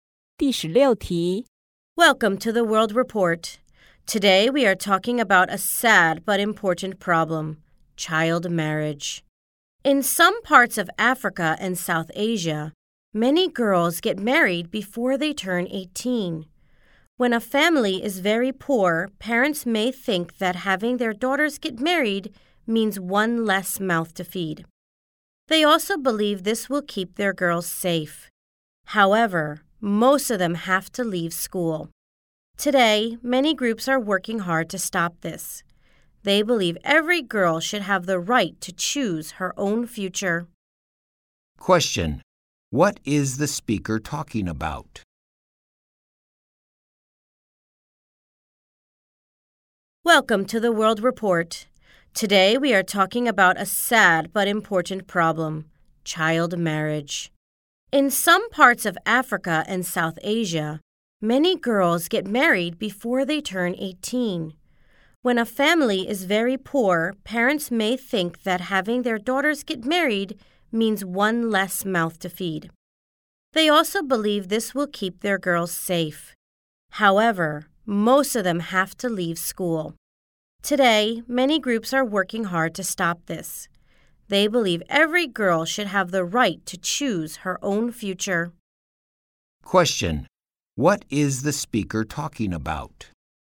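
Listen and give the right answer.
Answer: Child marriage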